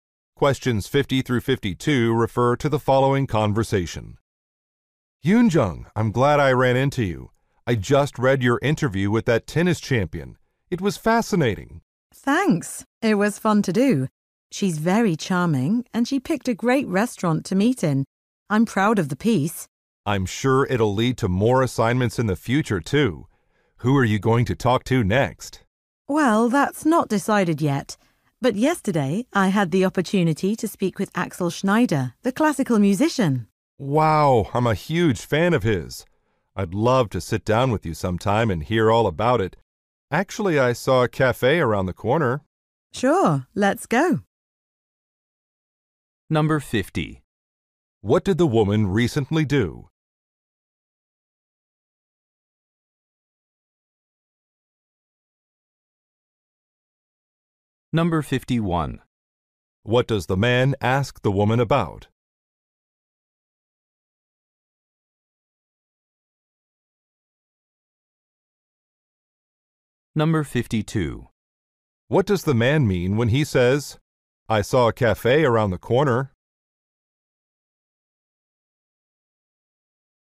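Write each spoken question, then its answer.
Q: What did the woman recently do?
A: Interviewed a tennis champion

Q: What does the man ask the woman about?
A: Who she will interview next

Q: What does the man mean when he says, I saw a cafe around the corner?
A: He suggests they go talk at the cafe now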